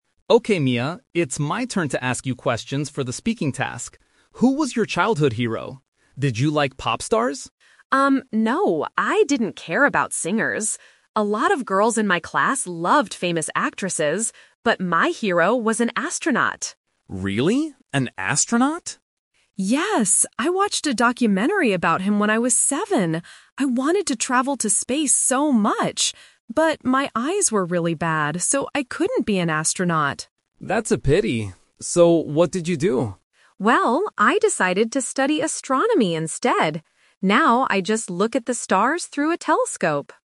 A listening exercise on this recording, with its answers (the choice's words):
Listen to two students, Leo and Mia, interviewing each other for a speaking class. Then, read the questions below and choose the correct answer (A, B, or C) for each question.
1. Who was Mia's childhood hero?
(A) A pop star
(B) An actress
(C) An astronaut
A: An astronaut

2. Why couldn't Mia become an astronaut?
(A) She hated traveling.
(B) Her eyes were bad.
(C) She was afraid of flying.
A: Her eyes were bad.

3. What does Mia do now to enjoy her interest in space?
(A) She looks at the stars.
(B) She makes documentaries.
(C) She travels to space.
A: She looks at the stars.

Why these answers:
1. Mia clearly says, "...but my hero was an astronaut." Option (A) is a trap; Leo asks if she liked pop stars, but Mia says she "didn't care about singers." Option (B) is a trap; she mentions that other girls in her class loved actresses, but not her.
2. Mia says, "But, my eyes were really bad, so I couldn't be an astronaut." Option (A) is a trap; the word "travel" is mentioned, but she actually "wanted to travel to space so much," so she didn't hate it. Option (C) is a plausible reason for not going to space, but it is never mentioned in the audio.
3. At the end of the conversation, Mia says, "Now I just look at the stars through a telescope!" Option (B) is a trap; she mentions a documentary, but she watched it when she was seven, she doesn't make them. Option (C) is a trap; traveling to space was her childhood dream, but she couldn't do it.

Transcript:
Leo: Okay, Mia, it's my turn to ask you questions for the speaking task. Who was your childhood hero? Did you like pop stars?
Mia: Um, no, I didn't care about singers. A lot of girls in my class loved famous actresses, but my hero was an astronaut.
Leo: Really? An astronaut?
Mia: Yes! I watched a documentary about him when I was seven. I wanted to travel to space so much. But, my eyes were really bad, so I couldn't be an astronaut.
Leo: That's a pity. So what did you do?
Mia: Well, I decided to study astronomy instead. Now I just look at the stars through a telescope!